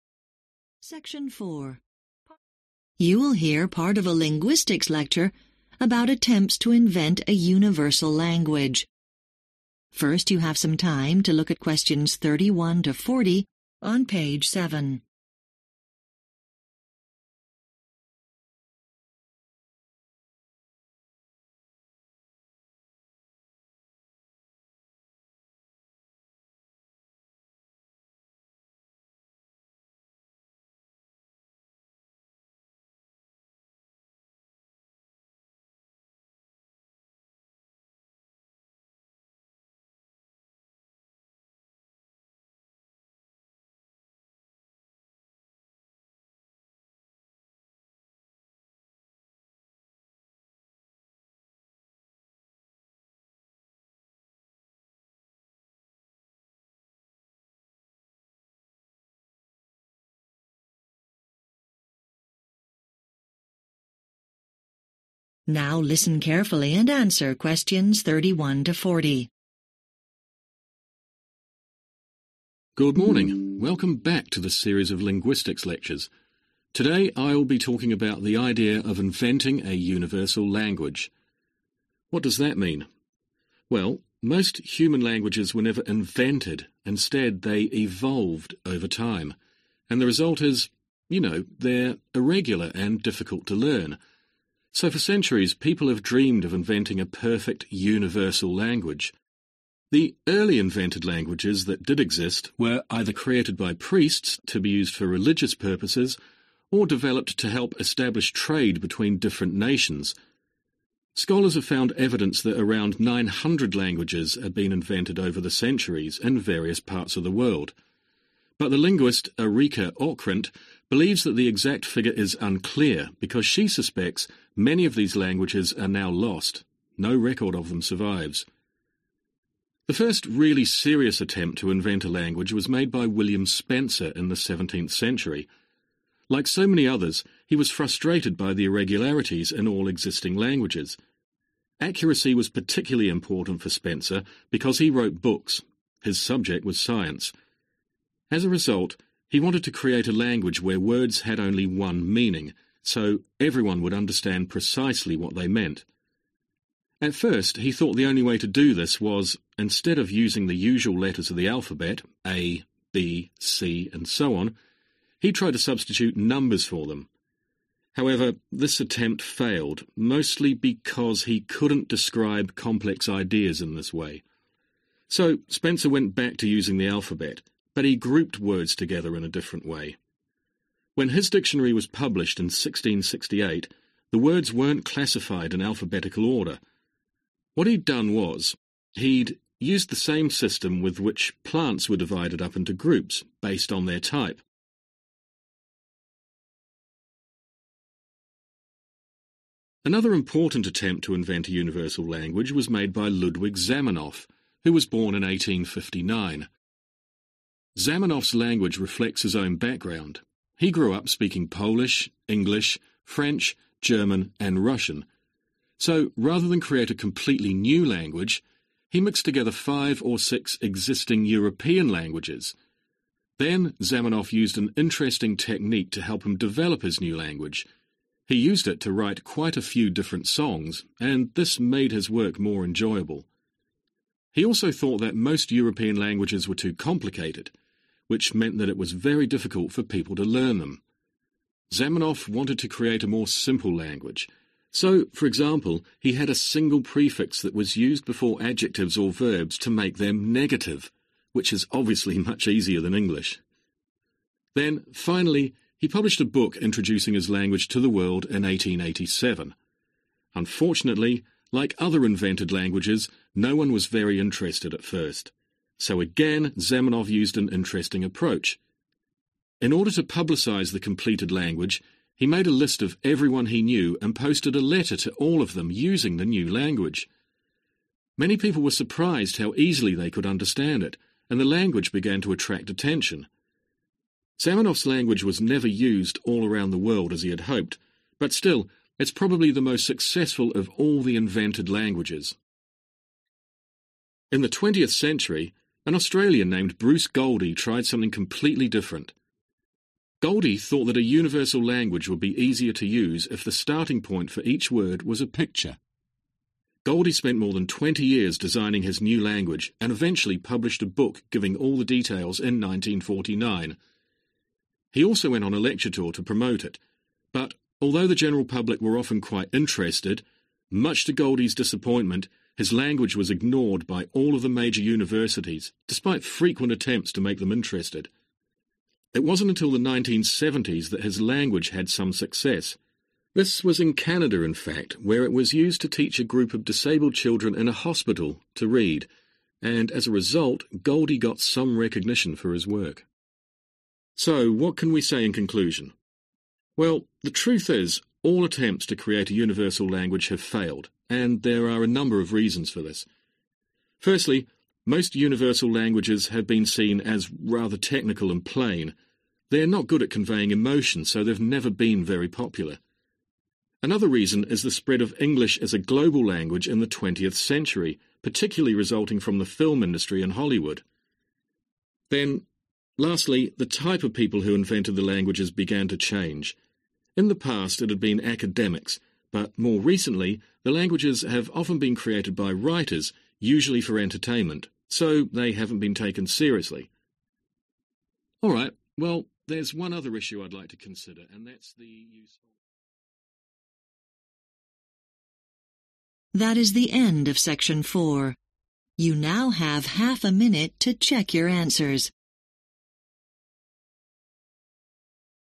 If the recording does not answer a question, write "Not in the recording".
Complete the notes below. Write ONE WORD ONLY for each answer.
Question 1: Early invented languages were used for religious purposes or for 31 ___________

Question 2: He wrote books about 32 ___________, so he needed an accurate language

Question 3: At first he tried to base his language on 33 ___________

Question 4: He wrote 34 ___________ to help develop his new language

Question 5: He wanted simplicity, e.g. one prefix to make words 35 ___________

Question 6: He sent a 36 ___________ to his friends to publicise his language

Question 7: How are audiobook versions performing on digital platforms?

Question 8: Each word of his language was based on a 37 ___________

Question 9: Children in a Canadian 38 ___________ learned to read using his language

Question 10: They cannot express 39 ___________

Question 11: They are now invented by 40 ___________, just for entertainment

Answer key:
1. trade
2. science
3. numbers
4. songs
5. negative
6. letter
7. Not in the recording
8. picture
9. hospital
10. emotion
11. writers